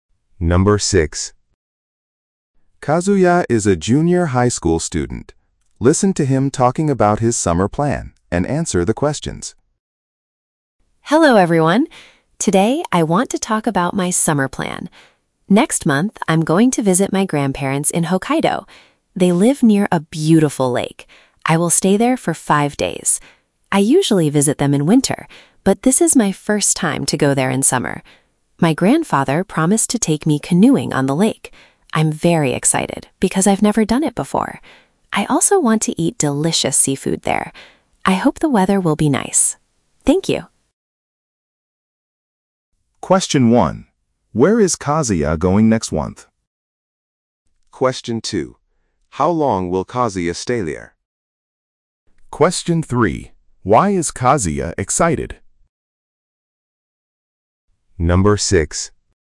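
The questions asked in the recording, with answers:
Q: Where is Kazuya going next month?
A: To his grandparents' home in Hokkaido.

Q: How long will Kazuya stay there?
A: For 5 days.

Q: Why is Kazuya excited?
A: Because he will go canoeing for the first time.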